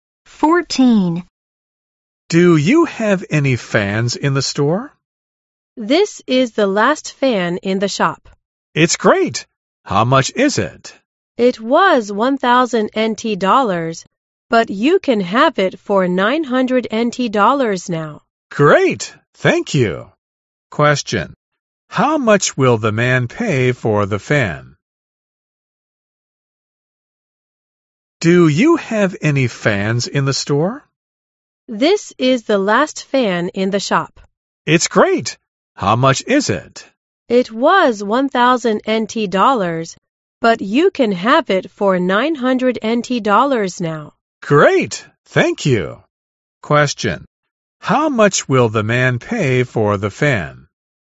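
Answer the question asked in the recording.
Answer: 900 NT dollars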